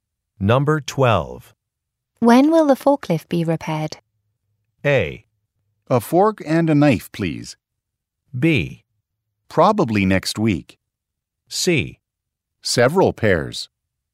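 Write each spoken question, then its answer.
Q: When will the forklift be repaired?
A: B: Probably next week.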